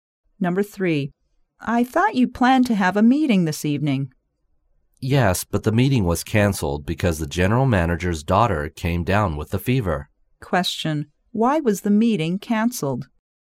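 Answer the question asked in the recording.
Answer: The general manager's daughter had a fever.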